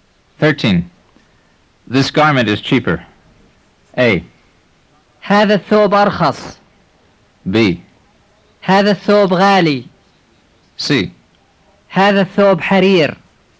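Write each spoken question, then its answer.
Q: This garment is cheaper.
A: A: هذا الثوب أرخص.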